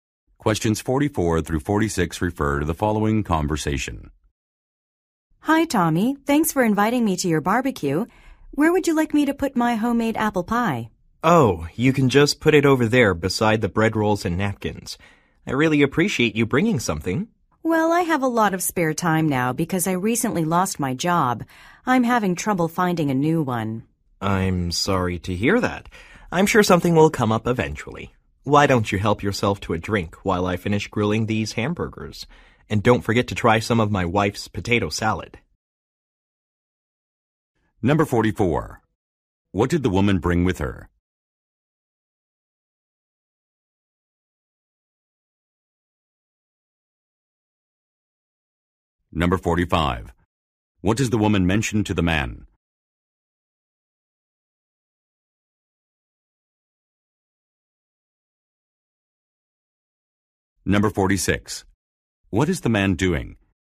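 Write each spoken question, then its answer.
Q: What did the woman bring with her?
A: A homemade apple pie

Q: What does the woman mention to the man?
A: She recently lost her job

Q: What is the man doing?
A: Grilling hamburgers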